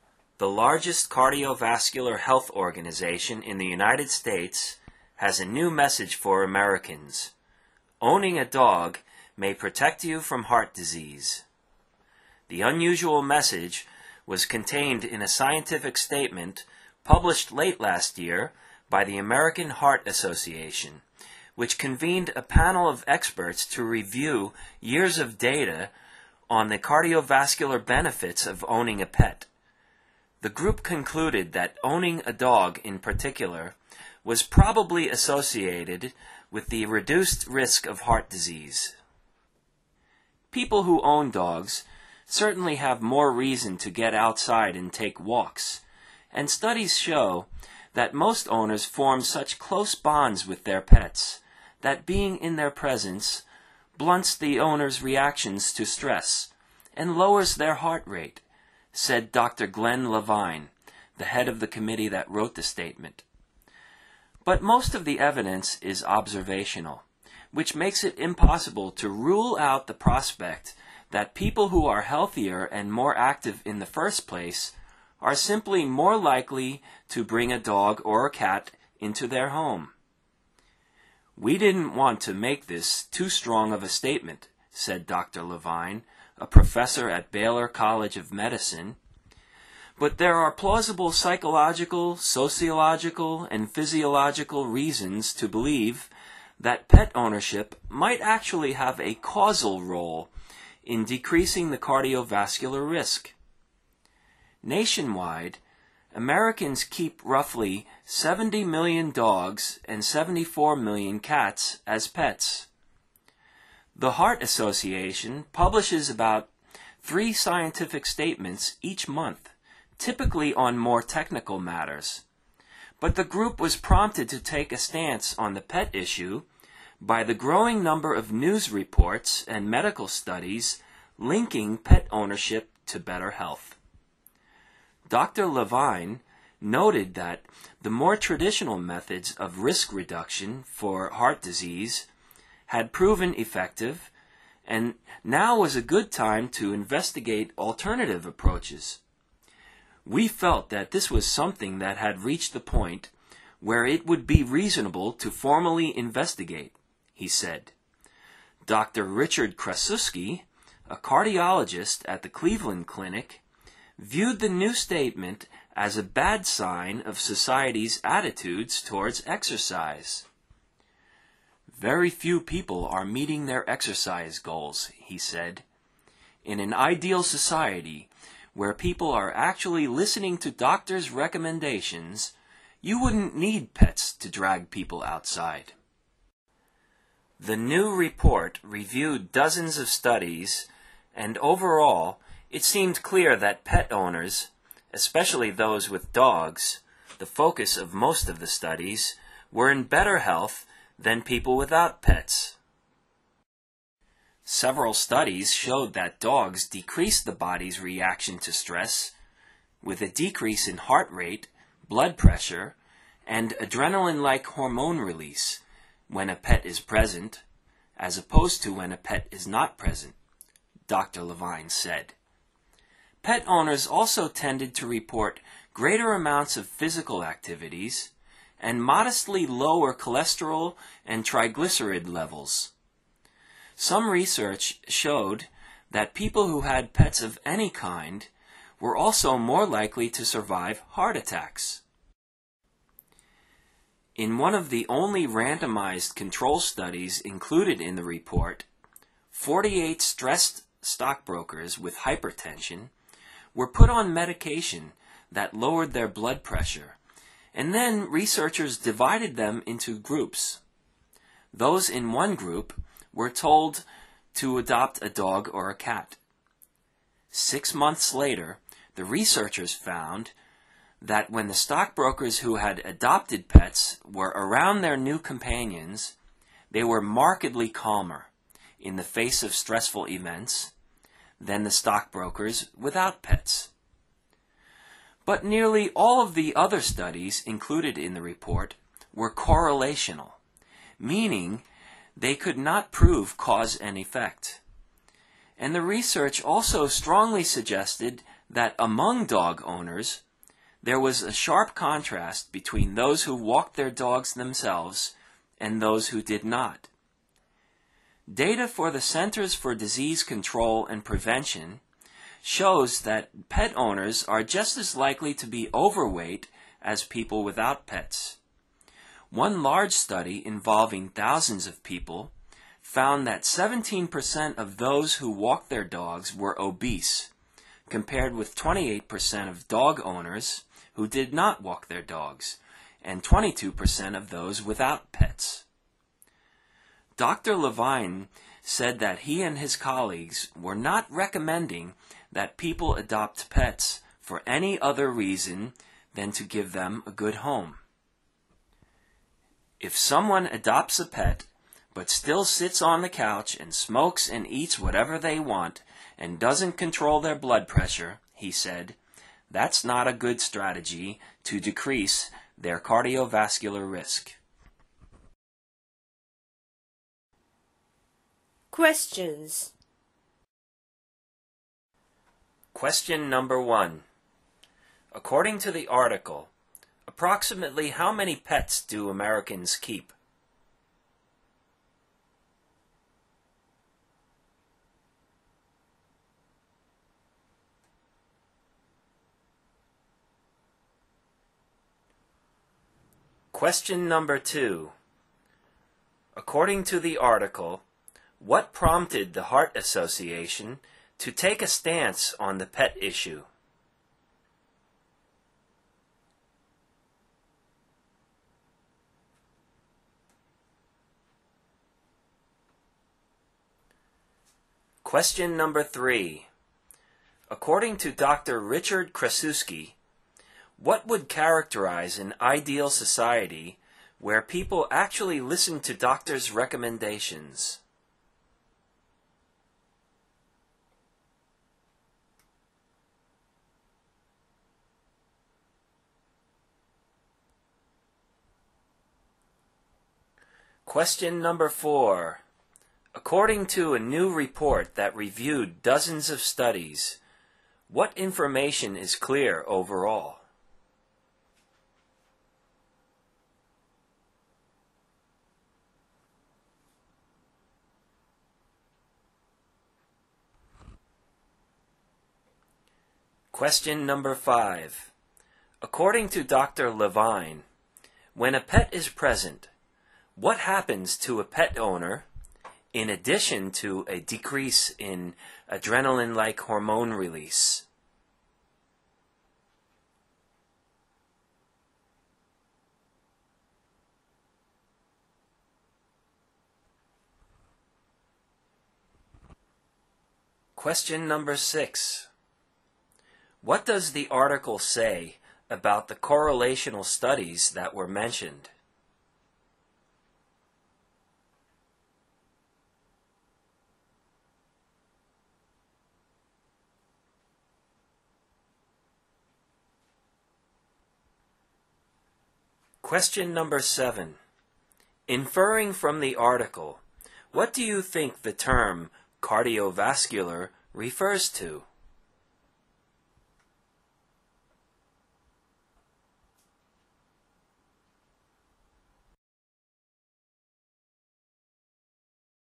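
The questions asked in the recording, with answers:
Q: According to the article, approximately how many pets do Americans keep?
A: About 144 million (roughly 70 million dogs and 74 million cats)

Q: According to the article, what prompted the Heart Association to take a stance on the pet issue?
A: The growing number of news reports and medical studies linking pet ownership to better health

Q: Richard Krasuski, what would characterize an ideal society where people actually listen to doctors' recommendations?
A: You wouldn't need pets to drag people outside

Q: According to a new report that reviewed dozens of studies, what information is clear overall?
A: Pet owners, especially dog owners, were in better health than people without pets

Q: Levine, when a pet is present, what happens to a pet owner in addition to a decrease in adrenaline-like hormone release?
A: Their heart rate and blood pressure decrease

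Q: What does the article say about the correlational studies that were mentioned?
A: They could not prove cause and effect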